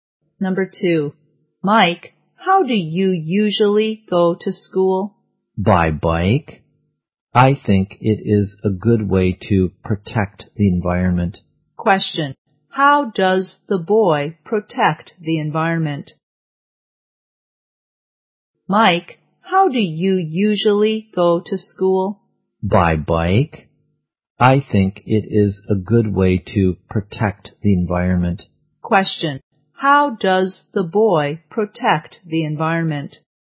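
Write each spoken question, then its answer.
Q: How does the boy protect the environment?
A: By going to school by bike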